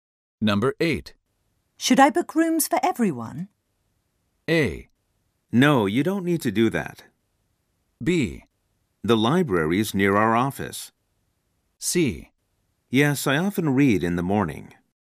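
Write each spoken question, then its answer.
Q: Should I book rooms for everyone?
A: A: No, you don't need to do that.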